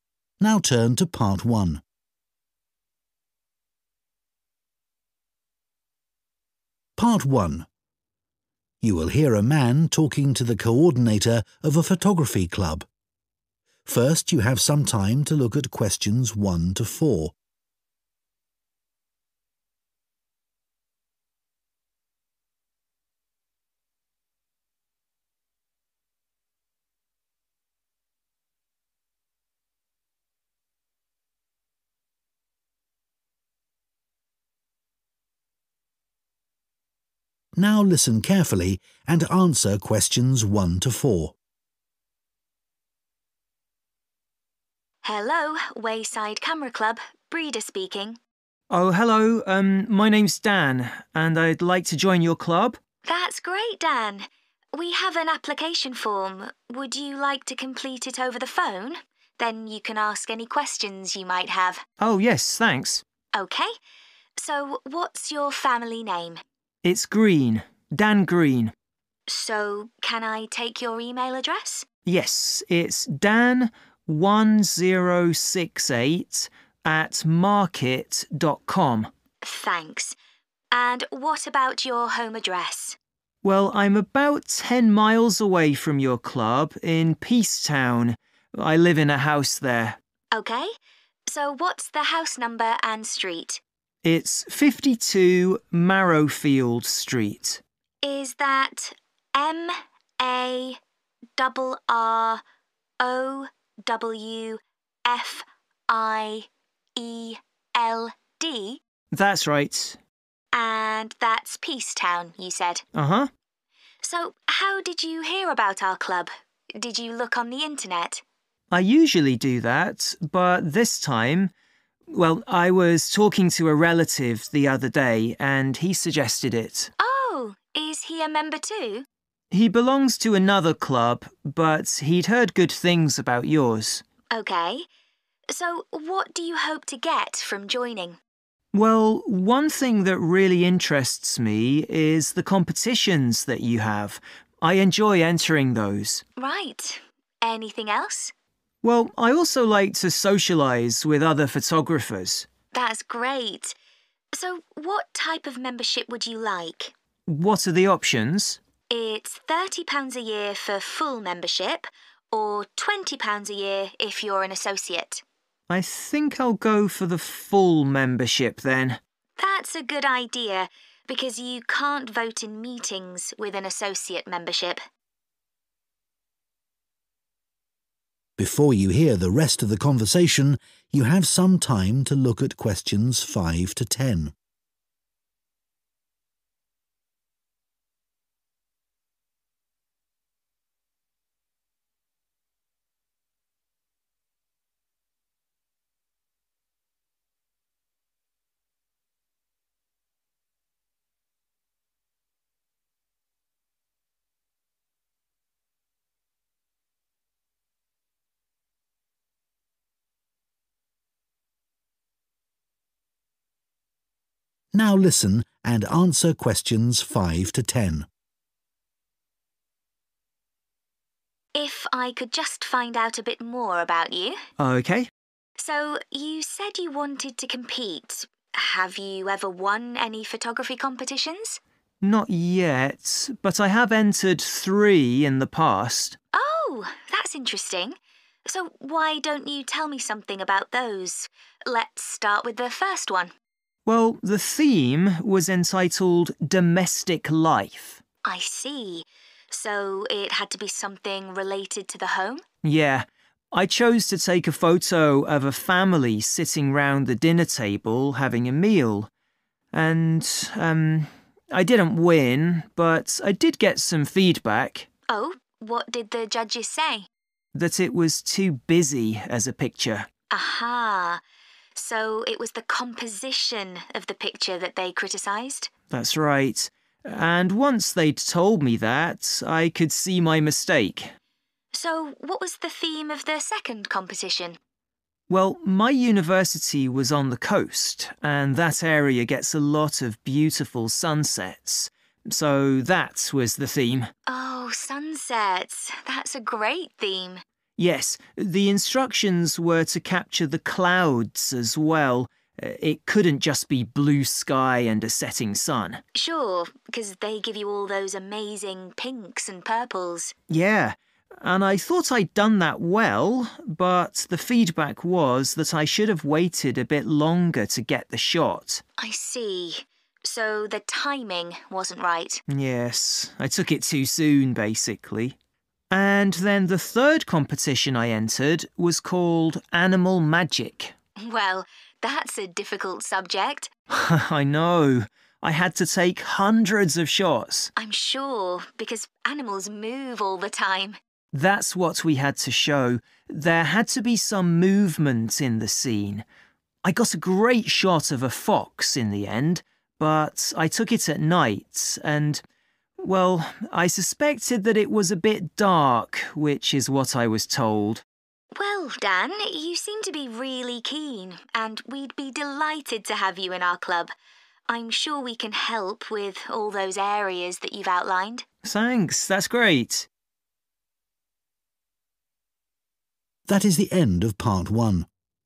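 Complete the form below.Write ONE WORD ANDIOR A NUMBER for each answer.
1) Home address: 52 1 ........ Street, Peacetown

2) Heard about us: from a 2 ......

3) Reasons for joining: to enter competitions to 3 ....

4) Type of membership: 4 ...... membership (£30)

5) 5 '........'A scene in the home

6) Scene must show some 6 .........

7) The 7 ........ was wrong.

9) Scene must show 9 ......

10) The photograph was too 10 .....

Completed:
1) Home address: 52 Marrowfield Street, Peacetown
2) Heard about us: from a relative
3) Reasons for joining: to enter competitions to socialise
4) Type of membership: full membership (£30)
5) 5 'Domestic Life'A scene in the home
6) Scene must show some clouds
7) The timing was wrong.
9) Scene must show movement
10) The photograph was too dark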